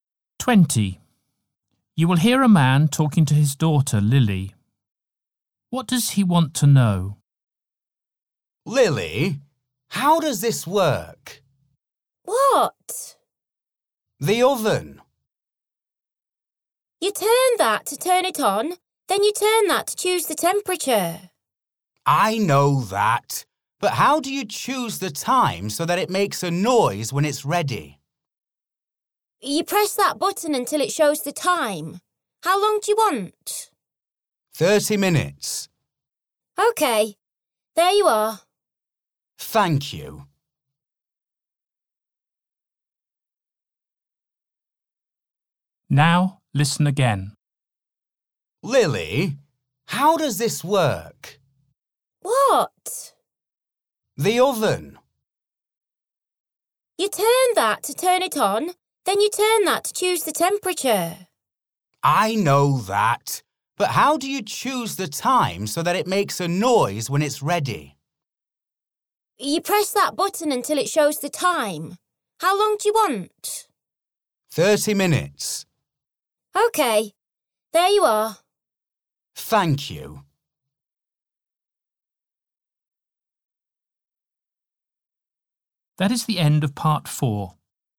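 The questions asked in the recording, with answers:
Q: What does he want to know?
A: How to set the oven timer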